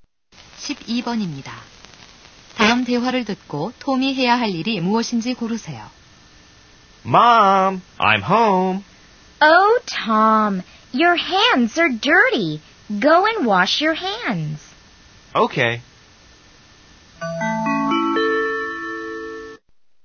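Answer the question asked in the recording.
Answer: 손 씻기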